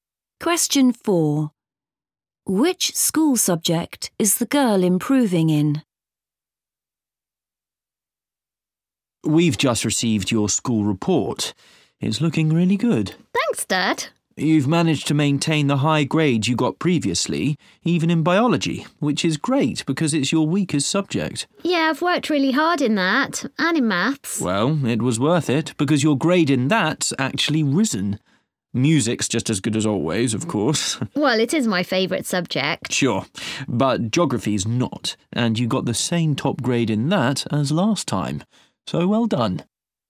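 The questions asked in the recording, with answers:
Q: Which school subject is the girl improving in?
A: Maths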